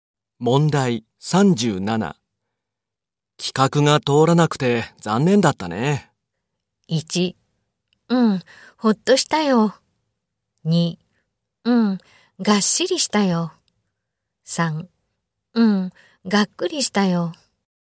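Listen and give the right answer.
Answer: 3: うん、がっくりしたよ。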